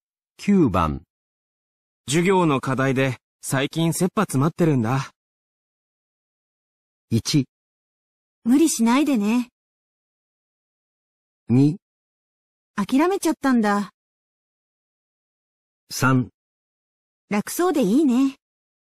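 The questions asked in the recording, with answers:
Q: 授業の課題で最近切羽詰まってるんだ。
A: 1: 無理しないでね。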